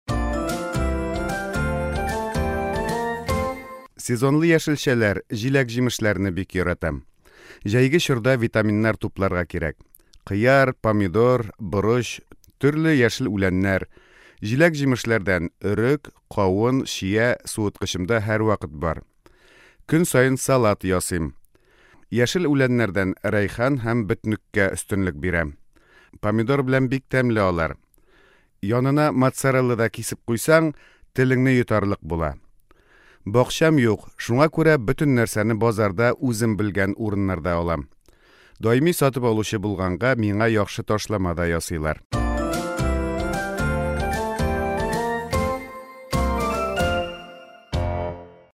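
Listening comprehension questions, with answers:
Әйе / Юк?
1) Фәритнең суыткычында яшелчәләр гел бар.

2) Фәрит яшелчәләрне авылдан ала, ә җиләк-җимешне базардан.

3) Фәритнең базарда ташламасы бар.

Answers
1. Әйе
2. Юк
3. Әйе

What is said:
Сезонлы яшелчәләр, җиләк-җимешләрне бик яратам. Җәйге чорда витаминнар тупларга кирәк. Кыяр, помидор, борыч, төрле яшел үләннәр, җиләк-җимешләрдән өрек, кавын, чия суыткычымда һәрвакыт бар. Көн саен салат ясыйм, яшел үләннәрдән рәйхан һәм бөтнеккә өстенлек бирәм. Помидор белән бик тәмле алар. Янына моцарелла да кисеп куйсаң, телеңне йотарлык була. Бакчам юк, шуңа күрә бөтен нәрсәне базарда үзем белгән урыннардан алам. Даими сатып алучы булганга, миңа яхшы ташлама да ясыйлар.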